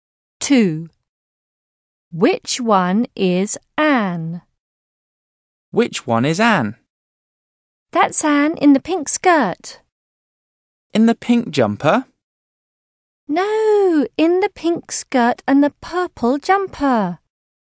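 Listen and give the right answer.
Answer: The one in the pink skirt and purple jumper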